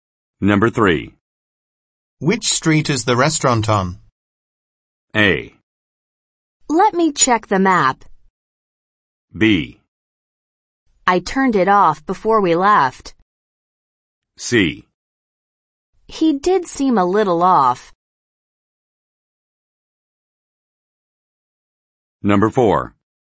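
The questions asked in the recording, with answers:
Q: Which street is the restaurant on?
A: A: Let me check the map.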